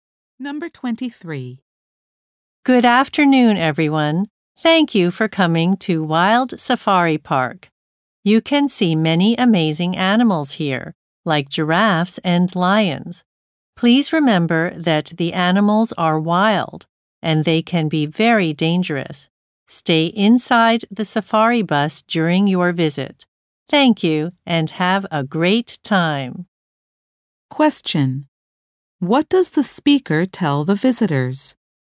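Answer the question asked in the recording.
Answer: Stay inside the safari bus.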